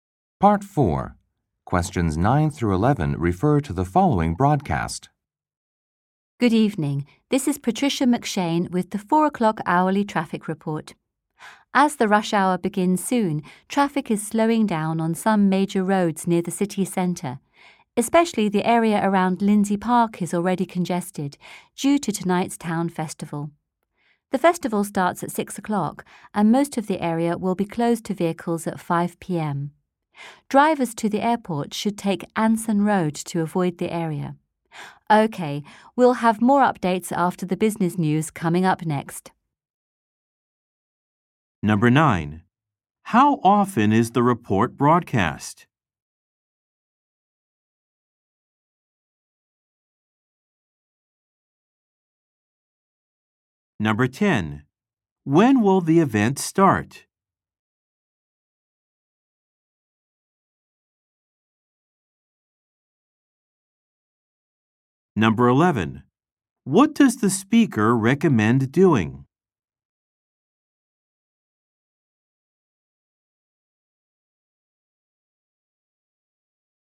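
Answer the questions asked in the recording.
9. Every hour
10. At 6 o'clock
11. Taking Anson Road to get to the airport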